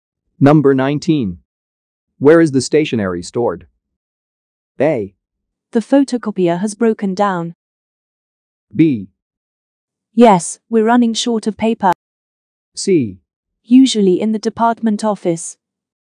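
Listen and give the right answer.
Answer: C: Usually in the department office.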